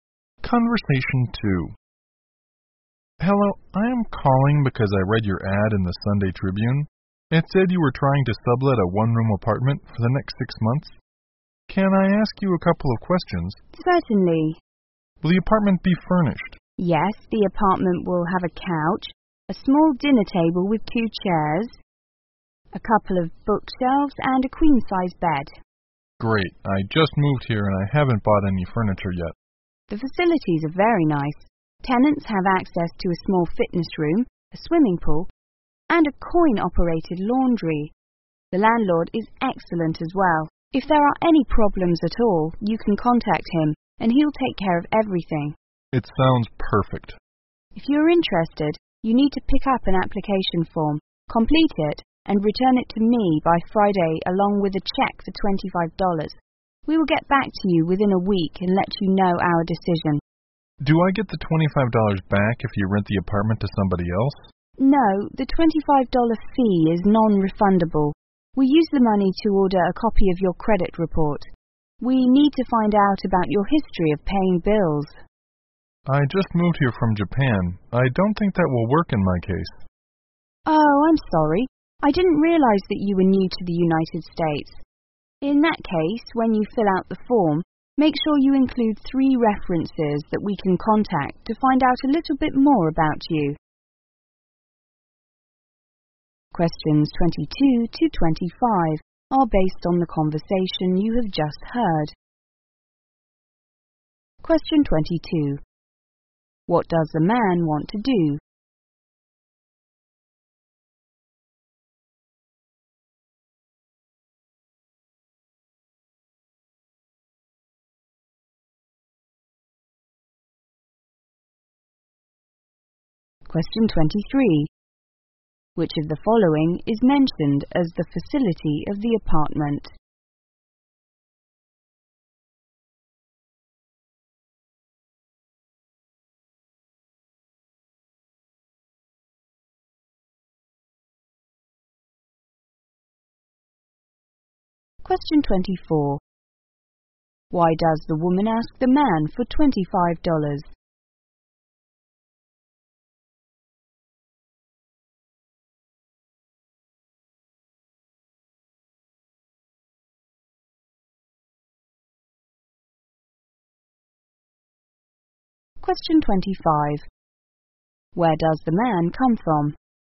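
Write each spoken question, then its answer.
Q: What does the man want to do?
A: Rent (sublet) the one-room apartment

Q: Which of the following is mentioned as the facility of the apartment?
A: A swimming pool (also a fitness room and a coin-operated laundry)

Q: Why does the woman ask the man for $25?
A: To order a copy of his credit report

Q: Where does the man come from?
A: Japan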